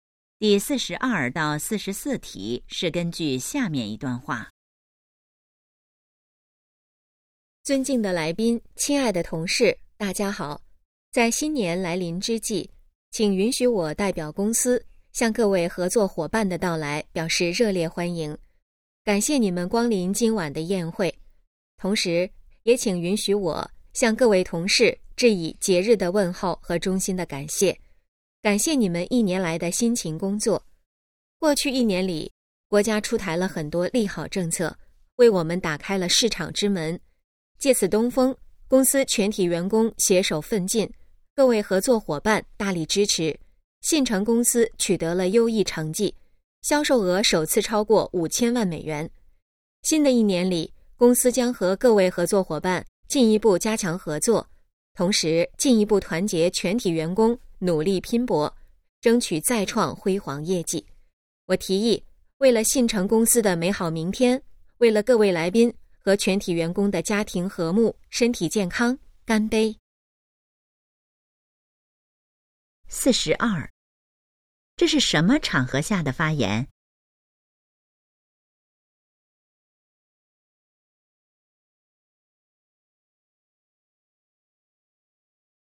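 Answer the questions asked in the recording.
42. 公司新年宴会
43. 超过5000万美元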